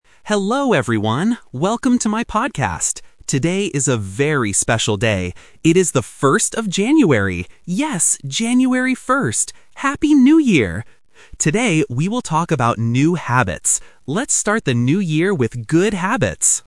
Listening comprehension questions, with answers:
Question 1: What is the date today?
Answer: January 1st

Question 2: What special event is it today?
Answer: The New Year

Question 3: What is the topic of the podcast today?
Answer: New habits

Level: A1